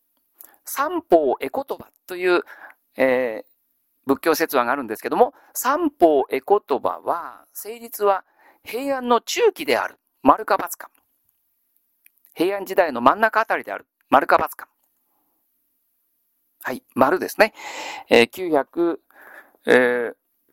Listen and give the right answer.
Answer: 丸ですね。